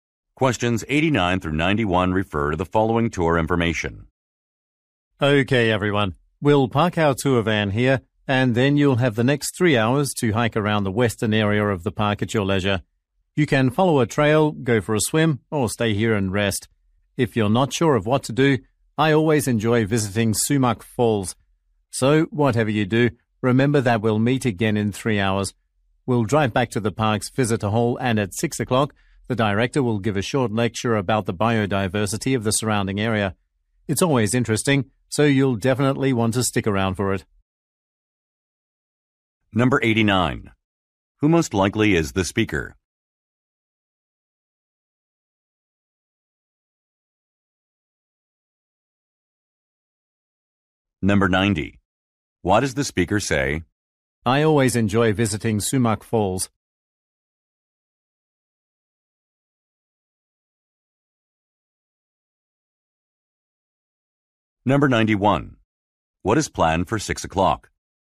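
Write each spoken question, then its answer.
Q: Who most likely is the speaker?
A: A tour guide

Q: What is planned for 6 o'clock?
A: A lecture on the area's biodiversity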